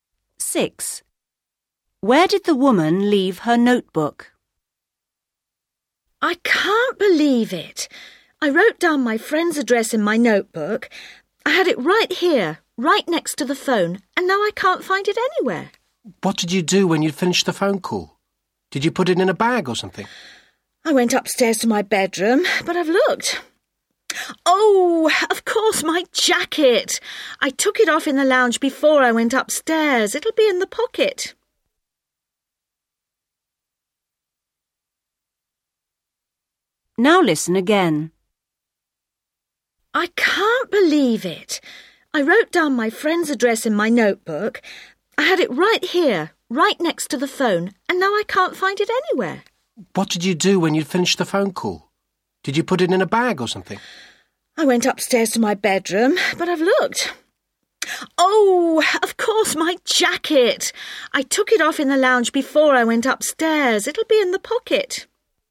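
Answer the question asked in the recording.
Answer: In her jacket pocket in the lounge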